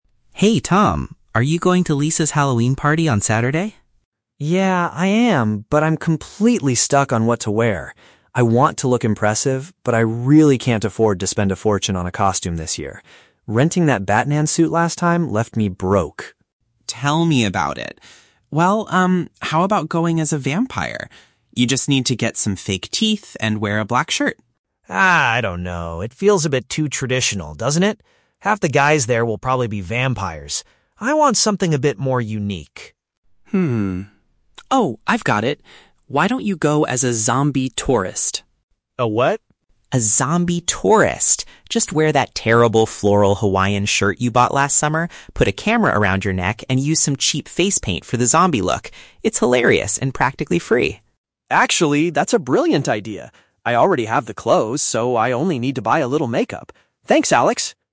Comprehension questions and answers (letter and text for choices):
Listen to a conversation between two roommates and choose the correct answer (A, B, or C) for each question.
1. What is Tom's main requirement for his Halloween costume?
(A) It must be a popular superhero character.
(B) It needs to be inexpensive to put together.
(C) It should be made of completely new clothes.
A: (B) It needs to be inexpensive to put together.

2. Why does Tom reject the idea of dressing up as a vampire?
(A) He feels the concept lacks originality.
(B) He thinks the required accessories cost too much.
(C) He is uncomfortable wearing dark clothing.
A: (A) He feels the concept lacks originality.

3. How does Tom feel about the "Zombie Tourist" suggestion?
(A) He is excited because it makes use of his existing wardrobe.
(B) He is pleased that he gets to buy a new tropical shirt.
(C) He is worried about how to apply the face paint properly.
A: (A) He is excited because it makes use of his existing wardrobe.

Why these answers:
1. In the audio, Tom says he "can't afford to spend a fortune" (which means he doesn't have much money to spend). Option (B) is the correct paraphrase. Option (A) is the trap; a superhero (Batman) is mentioned, but Tom brings it up as a negative example of spending too much money in the past. Option (C) is plausible but never mentioned.
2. Tom says the vampire idea is "too traditional" and that he wants "something a bit more unique". Option (A) paraphrases this perfectly. Option (B) is the trap; the audio mentions an accessory ("fake teeth"), but Tom does not complain about their cost, he complains about the idea being boring. Option (C) is a plausible guess but is not mentioned in the dialogue.
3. Tom loves the idea and says, "I already have the clothes." Option (A) uses synonyms like "existing wardrobe" to express this. Option (B) is the trap; a tropical ("Hawaiian") shirt is mentioned, but the trap is the word "buy" – Alex notes that Tom already bought it last summer. Option (C) is plausible because makeup is mentioned, but Tom is not worried about it at all.

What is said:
Alex: Hey, Tom. Are you going to Lisa's Halloween party on Saturday?
Tom: Yeah, I am, but I'm completely stuck on what to wear. I want to look impressive, but I really can't afford to spend a fortune on a costume this year. Renting that Batman suit last time left me broke!
Alex: Tell me about it. Well, um, how about going as a vampire? You just need to get some fake teeth and wear a black shirt.
Tom: Ah, I don't know. It feels a bit too traditional, doesn't it? Half the guys there will probably be vampires. I want something a bit more unique.
Alex: Hmm. Oh, I've got it! Why don't you go as a "Zombie Tourist"?
Tom: A what?
Alex: A zombie tourist! Just wear that terrible floral Hawaiian shirt you bought last summer, put a camera around your neck, and use some cheap face paint for the zombie look. It's hilarious and practically free.
Tom: Actually, that's a brilliant idea! I already have the clothes, so I only need to buy a little makeup. Thanks, Alex!